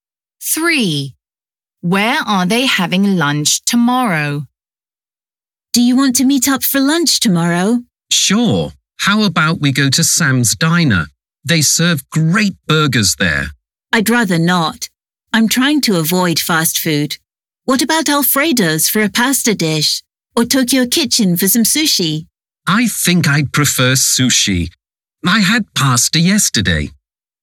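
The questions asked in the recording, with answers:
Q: Where are they having lunch tomorrow?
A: Tokyo Kitchen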